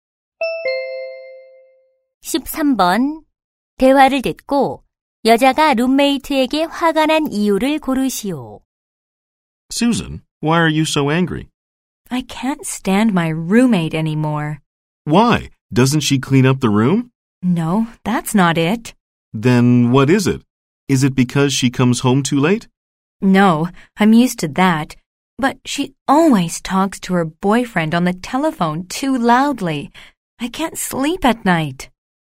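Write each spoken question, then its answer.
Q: 대화를 듣고 여자가 룸메이트에게 화가 난 이유를 고르시오.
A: 남자친구와 너무 큰 소리로 통화해서 잠을 못 자서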